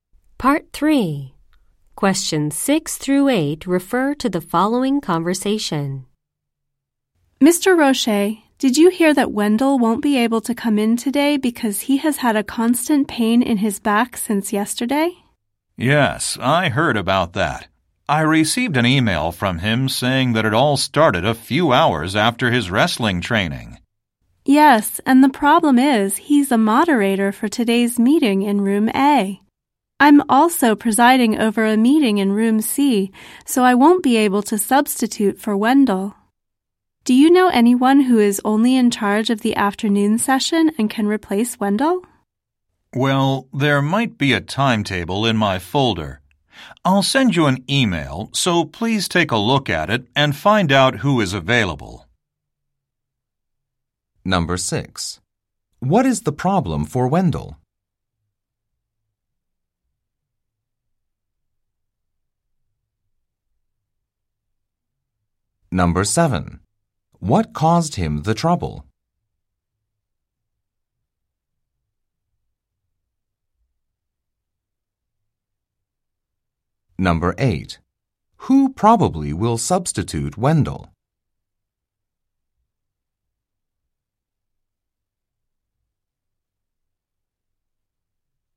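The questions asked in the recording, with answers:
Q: What is the problem for Wendell?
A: He has a constant pain in his back.

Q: What caused him the trouble?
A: His wrestling training.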